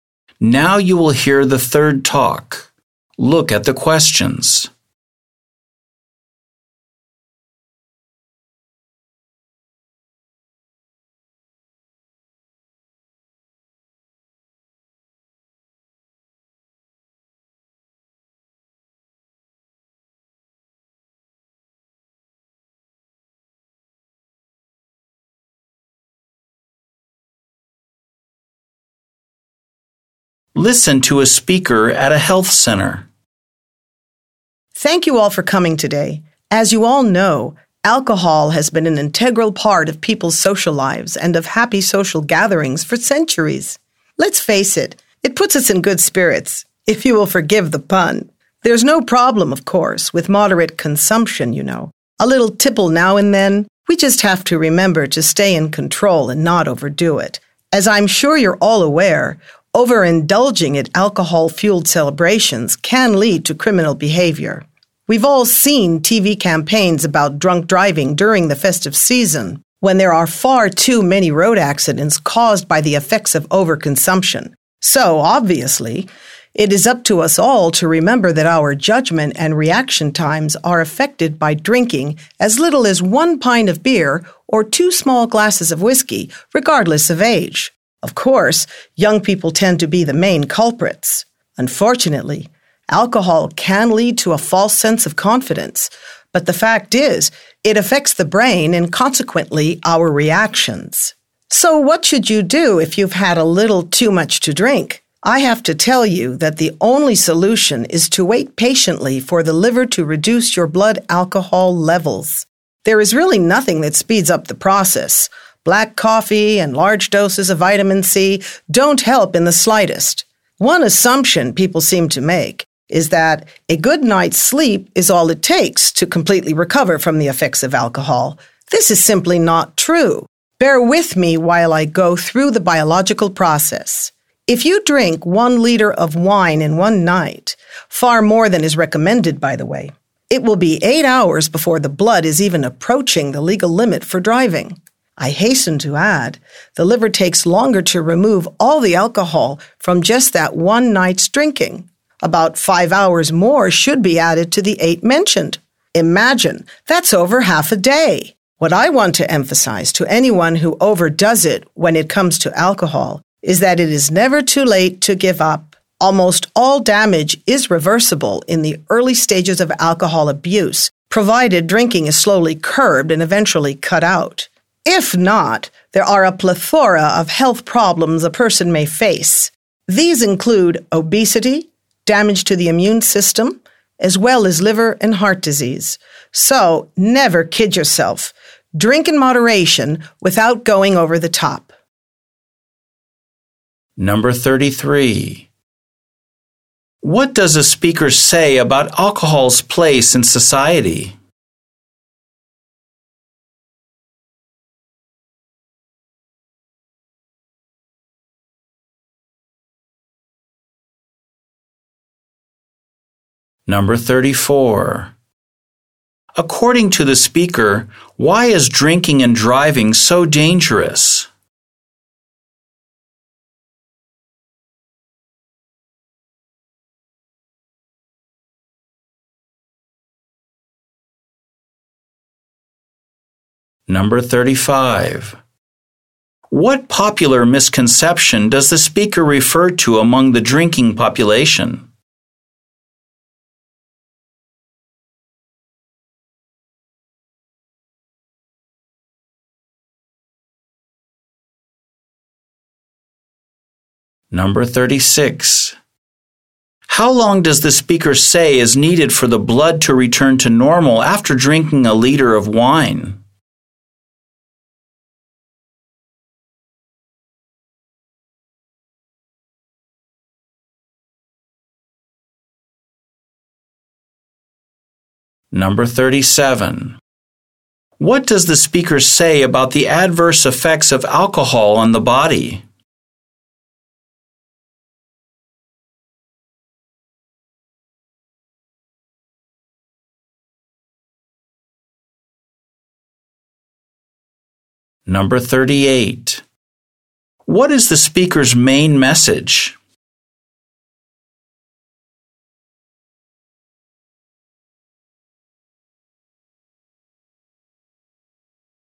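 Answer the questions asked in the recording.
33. It has been part of social gatherings for centuries
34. Even a little alcohol affects judgment and reaction times
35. That a good night's sleep is all you need to fully recover
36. About 13 hours (8 plus 5)
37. Almost all damage is reversible in the early stages if drinking is cut down and stopped
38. Drink in moderation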